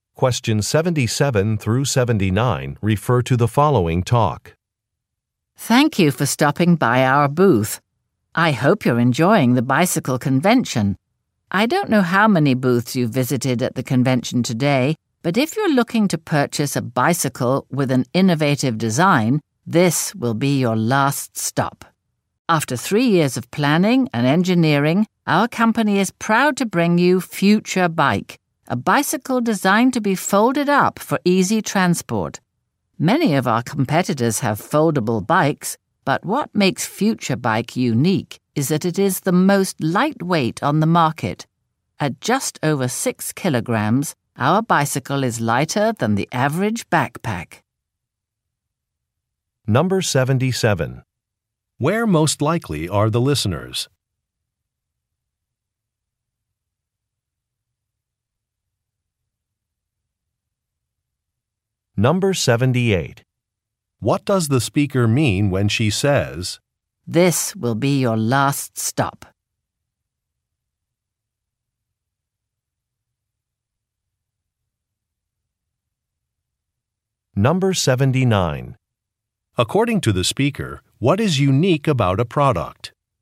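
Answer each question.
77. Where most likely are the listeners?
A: At a convention

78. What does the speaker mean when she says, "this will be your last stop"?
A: The listeners will want to buy a product.

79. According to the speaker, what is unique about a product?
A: The weight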